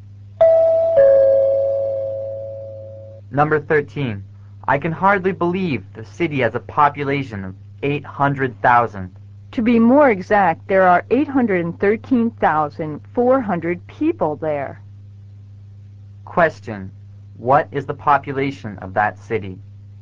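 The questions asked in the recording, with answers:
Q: What is the population of that city?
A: 813,400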